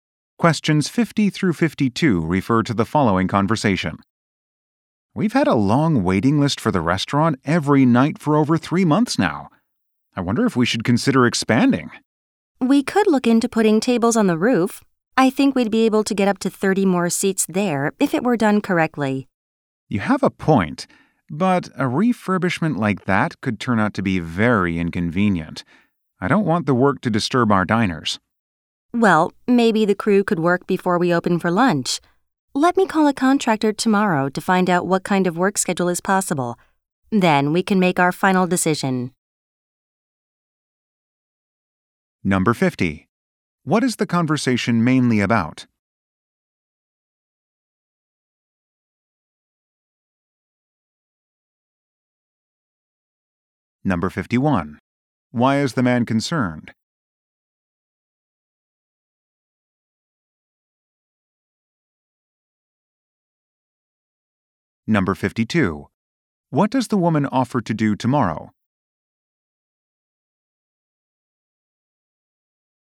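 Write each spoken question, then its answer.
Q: What is the conversation mainly about?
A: Expanding the restaurant by adding rooftop seating

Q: Why is the man concerned?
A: The renovation work could disturb diners

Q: What does the woman offer to do tomorrow?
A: Call a contractor about the work schedule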